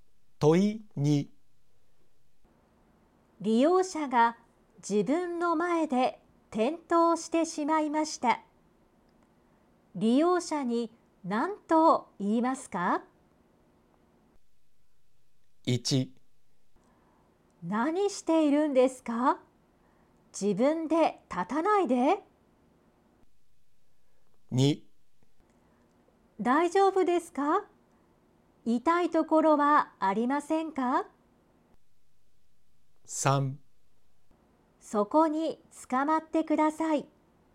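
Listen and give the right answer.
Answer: 2: 大丈夫ですか?痛いところはありませんか?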